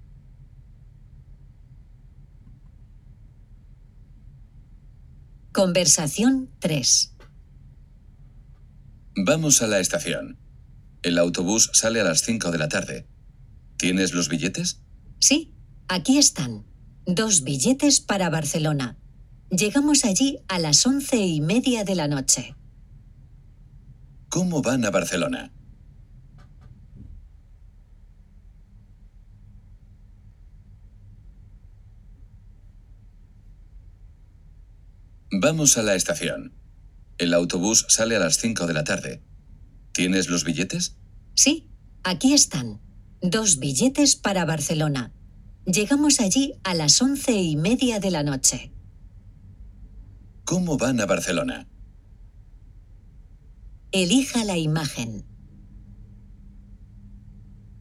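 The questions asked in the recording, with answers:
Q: ¿Cómo van a Barcelona?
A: En autobús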